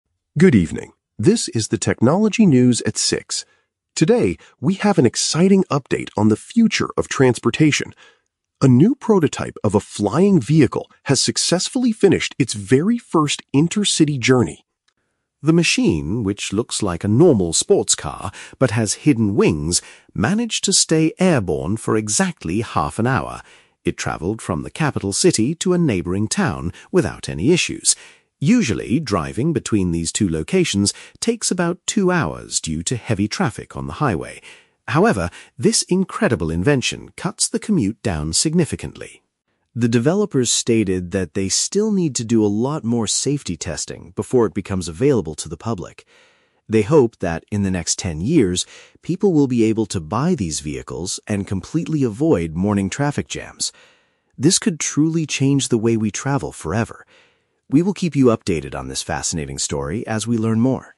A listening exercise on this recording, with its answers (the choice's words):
Listen to a news anchor reporting on a new invention. For each question, choose the correct answer (A, B, or C).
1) How long was the flying car in the air during the test?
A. Two hours.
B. Thirty minutes.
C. Ten years.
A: Thirty minutes.

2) How does the news anchor describe the appearance of the new machine?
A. It looks like a fast automobile with parts that allow it to fly.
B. It looks exactly like a traditional airplane but without wheels.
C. It looks like a large public bus designed for many passengers.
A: It looks like a fast automobile with parts that allow it to fly.

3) What must the creators do before ordinary people can purchase the vehicle?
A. Sell the invention to a major public transport company.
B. Build a special highway between the capital and the town.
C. Check carefully to ensure the machine is not dangerous to use.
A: Check carefully to ensure the machine is not dangerous to use.

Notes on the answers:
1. The news anchor says the machine managed to stay airborne for "exactly half an hour." Option (B) is a direct paraphrase (half an hour = 30 minutes). Option (A) is a trap; "two hours" is the time it takes to drive normally on the highway. Option (C) is a trap; "ten years" is when the developers hope the public can buy it.
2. The script mentions the vehicle "looks like a normal sports car but has hidden wings." Option (A) uses synonyms ("fast automobile" for "sports car", "parts that allow it to fly" for "wings"). Options (B) and (C) are incorrect and not mentioned in the audio.
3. The audio states that the developers "still need to do a lot more safety testing before it becomes available to the public." Option (C) paraphrases "safety testing" as "ensure the machine is not dangerous." Option (B) is a trap; the audio mentions a "highway," but it does not say they will build a special one. Option (A) is plausible in real life but is not mentioned in the news report.

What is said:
News Anchor: Good evening, this is the Technology News at 6. Today, we have an exciting update on the future of transportation. A new prototype of a flying vehicle has successfully finished its very first inter-city journey.
The machine, which looks like a normal sports car but has hidden wings, managed to stay airborne for exactly half an hour. It traveled from the capital city to a neighboring town without any issues. Usually, driving between these two locations takes about two hours due to heavy traffic on the highway. However, this incredible invention cuts the commute down significantly.
The developers stated that they still need to do a lot more safety testing before it becomes available to the public. They hope that, in the next ten years, people will be able to buy these vehicles and completely avoid morning traffic jams. This could truly change the way we travel forever. We will keep you updated on this fascinating story as we learn more.